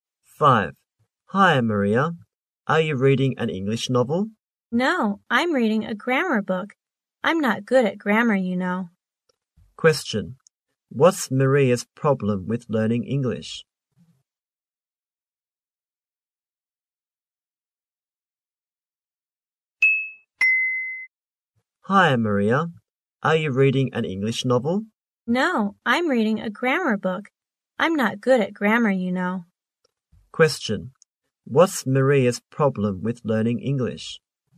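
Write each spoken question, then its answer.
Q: What's Maria's problem with learning English?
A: She's not good at grammar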